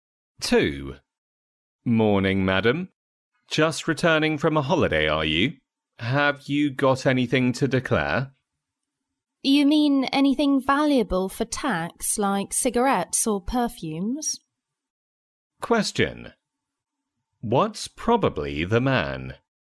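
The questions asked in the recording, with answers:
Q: What's probably the man?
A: A customs officer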